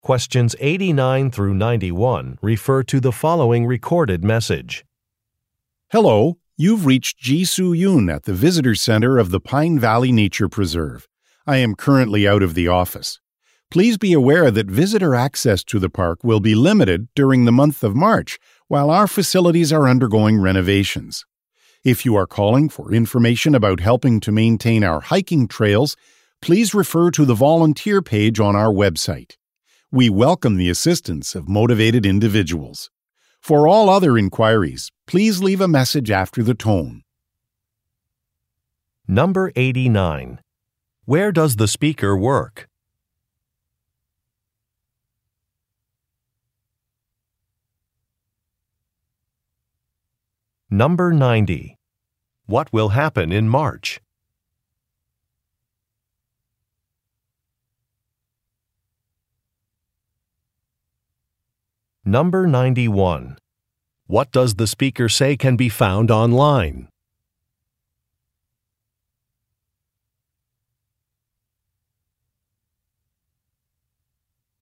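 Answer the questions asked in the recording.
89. At the visitor center of a nature preserve
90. Facilities will be renovated, limiting visitor access
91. Information about volunteering to maintain hiking trails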